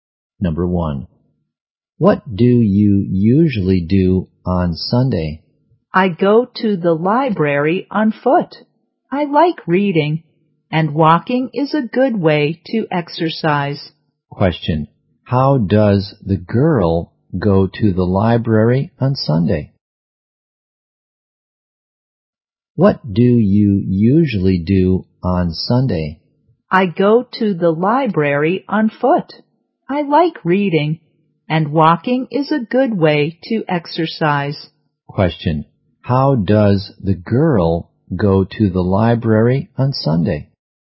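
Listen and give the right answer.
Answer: On foot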